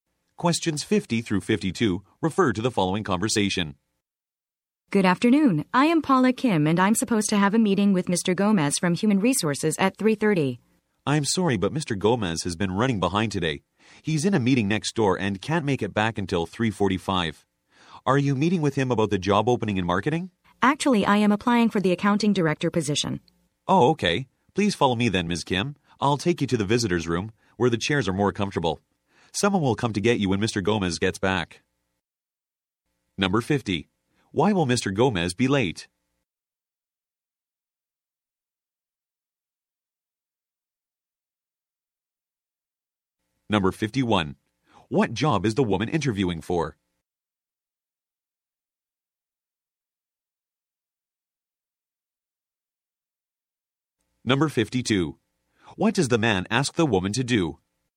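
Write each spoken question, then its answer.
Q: Why will Mr. Gomez be late?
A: He is in a meeting next door

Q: What job is the woman interviewing for?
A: Accounting director

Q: What does the man ask the woman to do?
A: Follow him to the visitor's room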